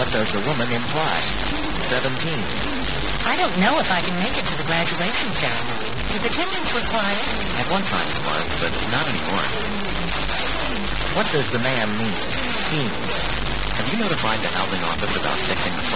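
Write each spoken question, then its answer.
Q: What does the man mean?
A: Attendance is no longer required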